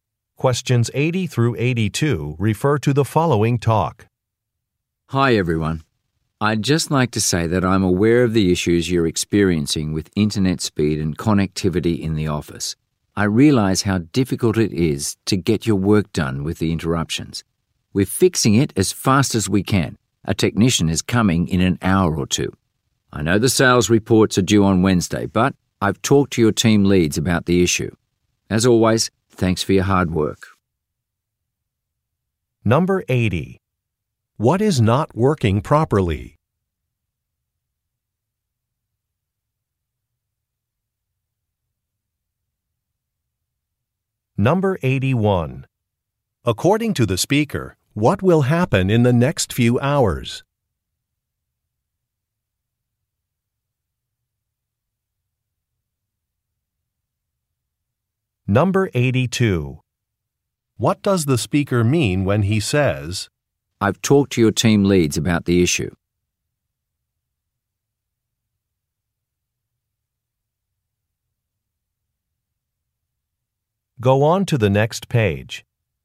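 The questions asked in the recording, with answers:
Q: What is not working properly?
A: The internet connection

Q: According to the speaker, what will happen in the next few hours?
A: A technician will come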